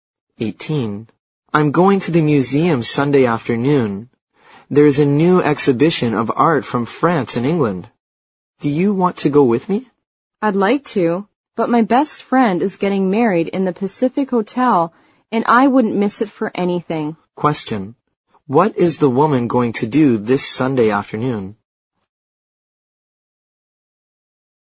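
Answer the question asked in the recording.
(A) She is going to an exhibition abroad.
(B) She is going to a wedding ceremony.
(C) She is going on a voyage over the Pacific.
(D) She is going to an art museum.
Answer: (B) She is going to a wedding ceremony.

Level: 六级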